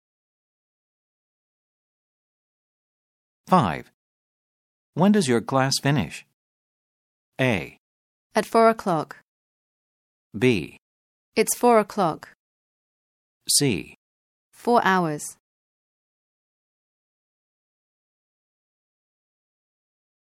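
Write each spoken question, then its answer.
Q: When does your class finish?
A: A: At 4 o'clock.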